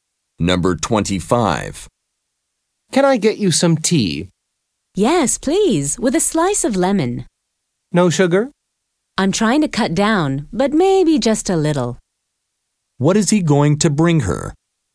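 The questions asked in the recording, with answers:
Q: What is he going to bring her?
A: Tea with lemon and a little sugar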